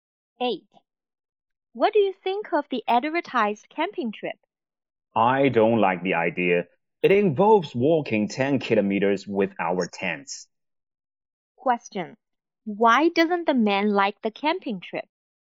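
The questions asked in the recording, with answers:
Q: Why doesn't the man like the camping trip?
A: It involves walking 10 kilometers with tents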